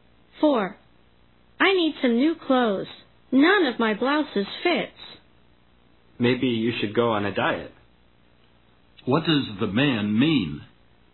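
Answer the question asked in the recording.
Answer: The woman should go on a diet.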